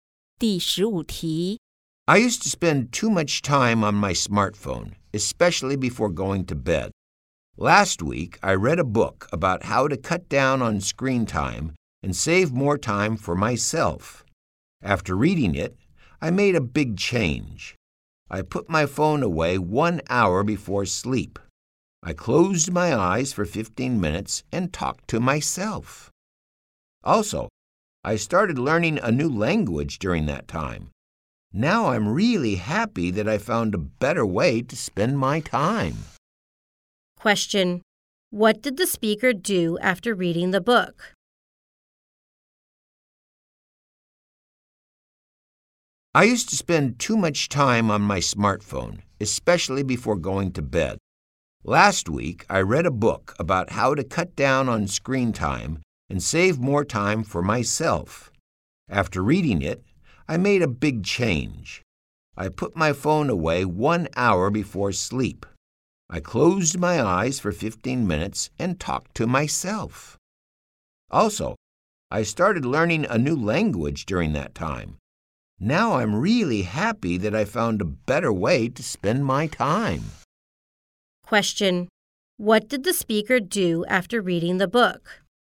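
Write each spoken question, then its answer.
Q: Question: What did the speaker do after reading the book?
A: Put the phone away 1 hour before sleep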